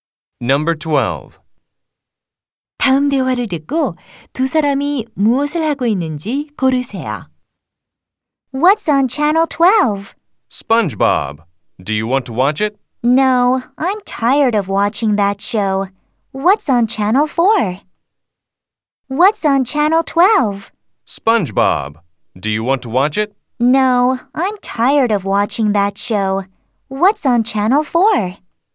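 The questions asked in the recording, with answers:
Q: 다음 대화를 듣고 두 사람이 무엇을 하고 있는지 고르세요.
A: TV를 보고 있다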